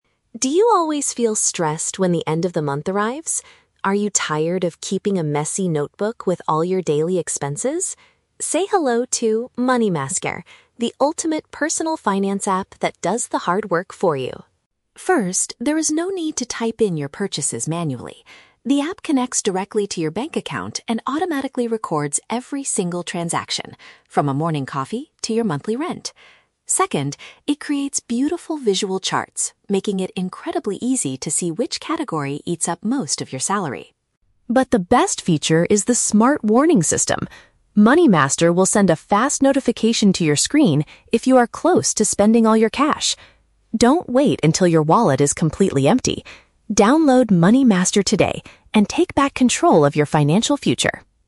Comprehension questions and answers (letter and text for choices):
Listen to a radio advertisement for a new mobile application. For each question, choose the correct answer (A, B, or C).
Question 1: What is one major problem the app tries to solve for its users?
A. Forgetting to pay their monthly rent and bills on time.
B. Relying on disorganized paper records to track spending.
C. Spending too much money on morning coffee every day.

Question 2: How does the application record the user's daily shopping?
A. By requiring users to type the exact numbers in themselves.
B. By scanning the paper receipts given by the shop assistants.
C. By linking straight to the user's personal financial institution.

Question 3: When does the smart warning system send a message to the user?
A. Whenever their remaining funds drop to a dangerously low level.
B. Right after they have completely run out of money in their account.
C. Exactly one week before their next salary is deposited into the bank.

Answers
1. B. Relying on disorganized paper records to track spending.
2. C. By linking straight to the user's personal financial institution.
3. A. Whenever their remaining funds drop to a dangerously low level.

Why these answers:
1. The announcer asks if you are "tired of keeping a messy notebook with all your daily expenses" (relying on disorganized paper records). Option (A) is a trap; the app records your "monthly rent," but the ad doesn't say it helps you remember to pay it. Option (C) is a trap; "morning coffee" is just an example of a recorded transaction, not the main problem being solved.
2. The ad states that the app "connects directly to your bank account" (linking straight to a personal financial institution). Option (A) is a trap; the speaker explicitly says, "there is no need to type in your purchases manually." Option (B) is a plausible feature for other apps, but it is never mentioned here
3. The app sends a notification "if you are close to spending all your cash" (when funds drop to a dangerously low level). Option (B) is a trap; the speaker warns, "Don't wait until your wallet is completely empty," meaning the alert happens before the money is gone. Option (C) is not mentioned in the audio.

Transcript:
Announcer: Do you always feel stressed when the end of the month arrives? Are you tired of keeping a messy notebook with all your daily expenses? Say hello to 'MoneyMaster', the ultimate personal finance app that does the hard work for you!
First, there is no need to type in your purchases manually. The app connects directly to your bank account and automatically records every single transaction, from a morning coffee to your monthly rent. Second, it creates beautiful visual charts, making it incredibly easy to see which category eats up most of your salary.
But the best feature is the smart warning system. MoneyMaster will send a fast notification to your screen if you are close to spending all your cash. Don't wait until your wallet is completely empty. Download MoneyMaster today and take back control of your financial future!